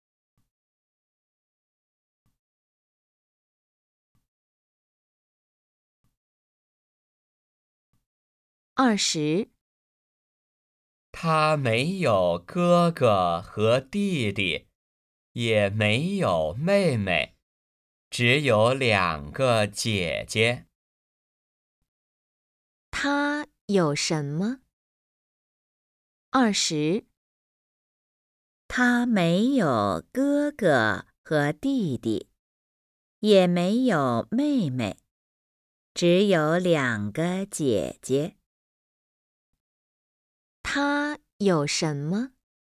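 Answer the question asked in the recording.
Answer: 两个姐姐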